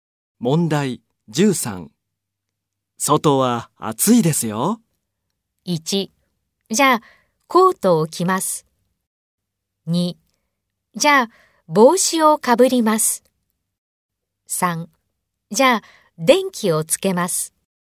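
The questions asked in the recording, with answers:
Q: 外は暑いですよ。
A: 2: じゃあ帽子をかぶります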